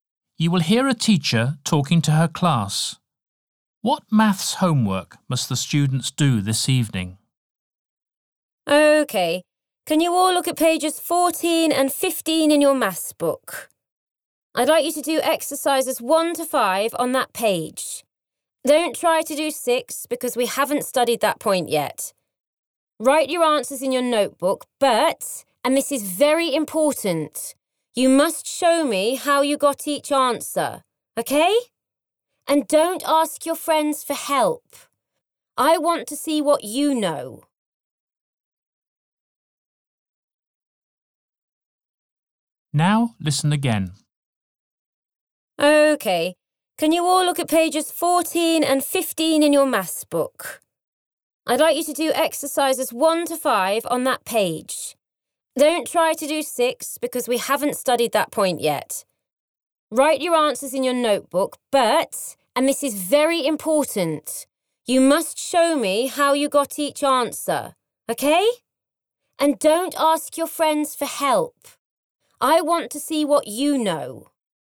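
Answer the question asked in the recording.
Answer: Exercises 1 to 5 on pages 14 and 15, showing how they got each answer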